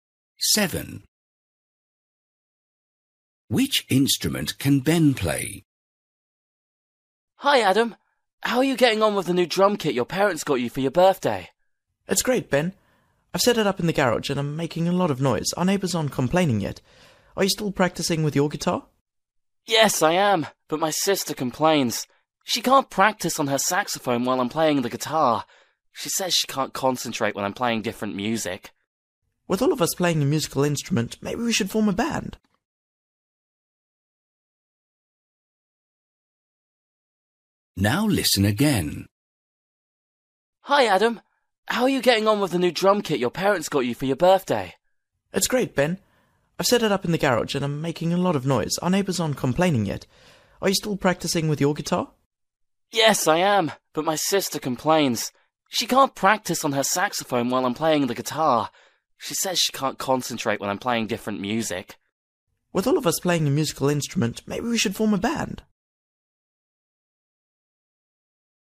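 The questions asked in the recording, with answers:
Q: Which instrument can Ben play?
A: The guitar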